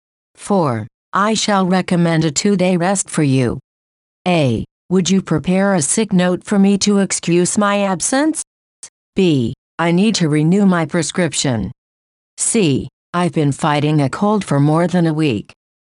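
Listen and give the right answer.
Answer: A: Would you prepare a sick note for me to excuse my absence?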